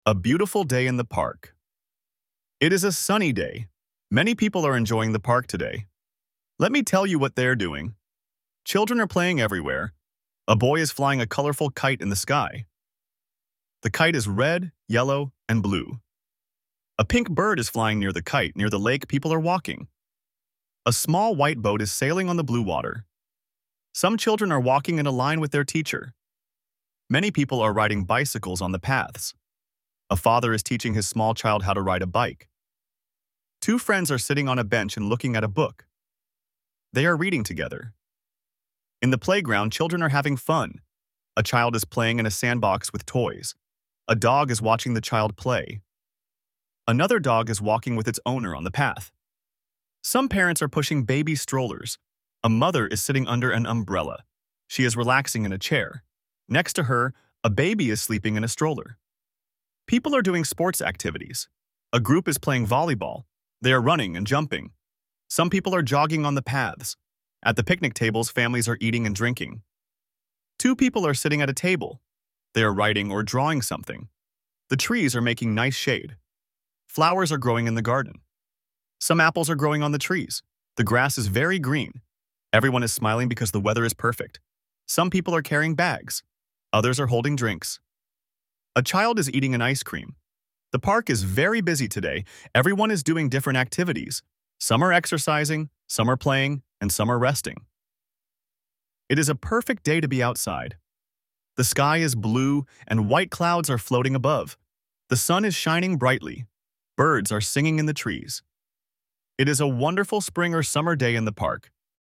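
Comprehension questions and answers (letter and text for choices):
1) What is the weather like in the park?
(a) rainy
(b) cloudy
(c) sunny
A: (c) sunny

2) What color is the kite?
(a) only red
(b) red, yellow, and blue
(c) green and blue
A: (b) red, yellow, and blue

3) What are two friends doing on the bench?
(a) sleeping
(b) eating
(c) reading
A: (c) reading

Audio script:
OG_TITLE: A Beautiful Day in the Park (A1) - A1-A2 olvasás
NEAR_AUDIO: It is a sunny day. Many people are enjoying the park today. Let me tell you what they are doing! Children are playing everywhere. A boy is flying a colorful kite in the sky. The kite is red, yellow, and blue. A pink bird is flying near the kite. Near the lake, people are walking. A small white boat is sailing on the blue water. Some children are walking in a line with their teacher. A father is teaching his small child how to ride a bike. Two friends are sitting on a bench and looking at a book. 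They are reading together. In the playground, children are having fun. A child is playing in a sandbox with toys. A dog is watching the child play. Another dog is walking with its owner on the path. Some parents are pushing baby strollers. A mother is sitting under an umbrella. She is relaxing in a chair. Next to her, a baby is sleeping in a stroller. People are doing sports activities. A group is playing volleyball. They are running and jumping. Some people are jogging on the paths. At the picnic tables, families are eating and drinking. Two people are sitting at a table. They are writing or drawing something. The trees are making nice shade. Flowers are growing in the garden. Some apples are growing on the trees. The grass is very green. Everyone is smiling because the weather is perfect. Some people are carrying bags. Others are holding drinks. A child is eating an ice cream. The park is very busy today. 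Everyone is doing different activities. Some are exercising, some are playing, and some are resting. It is a perfect day to be outside. The sky is blue, and white clouds are floating above. The sun is shining brightly. Birds are singing in the trees. It is a wonderful spring or summer day in the park!

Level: A1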